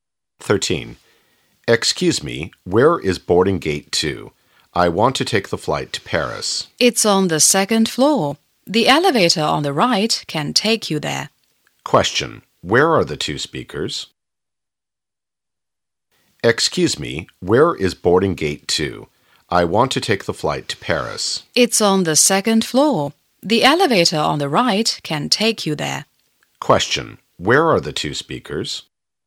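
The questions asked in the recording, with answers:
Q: Question, where are the two speakers?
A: At an airport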